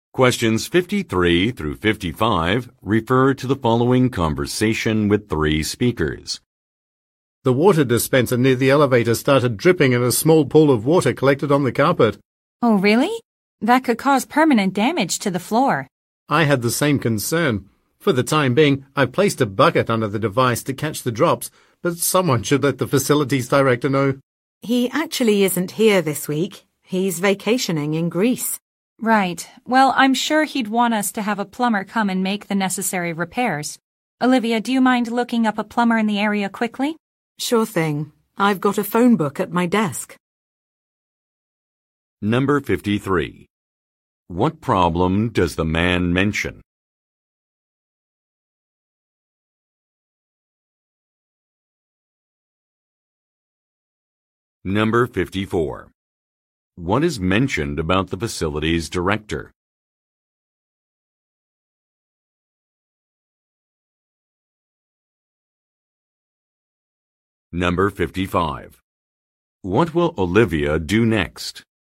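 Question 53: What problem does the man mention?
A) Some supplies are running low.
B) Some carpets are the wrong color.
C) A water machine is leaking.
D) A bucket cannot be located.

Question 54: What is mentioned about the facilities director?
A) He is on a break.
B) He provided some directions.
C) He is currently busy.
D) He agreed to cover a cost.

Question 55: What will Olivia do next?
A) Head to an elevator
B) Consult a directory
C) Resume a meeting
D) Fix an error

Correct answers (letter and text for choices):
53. C) A water machine is leaking.
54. A) He is on a break.
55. B) Consult a directory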